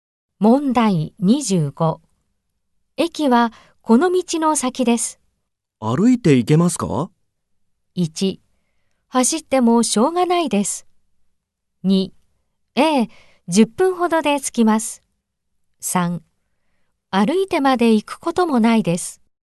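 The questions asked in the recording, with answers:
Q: 駅はこの道の先です。歩いて行けますか?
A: 2: ええ、10分ほどで着きます。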